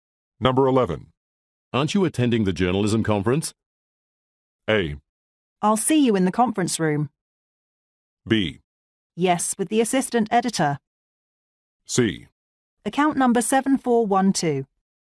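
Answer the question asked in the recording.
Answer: B: Yes, with the assistant editor.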